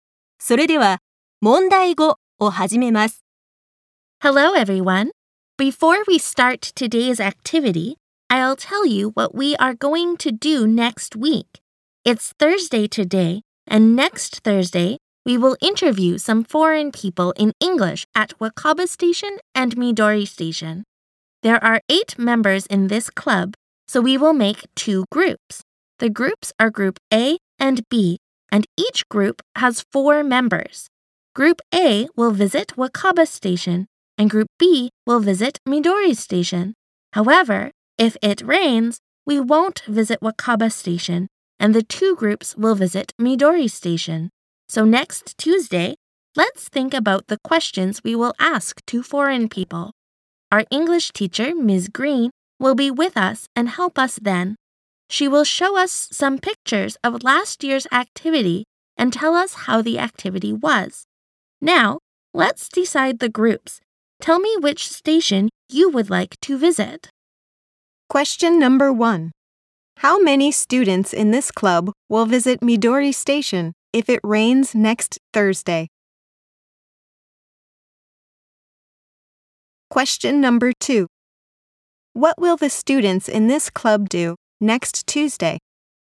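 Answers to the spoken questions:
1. Eight
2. Think about the questions they will ask foreign people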